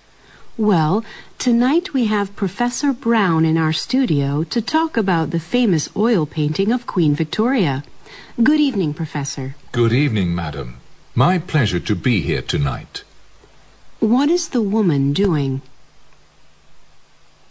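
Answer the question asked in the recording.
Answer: Hosting a program and interviewing Professor Brown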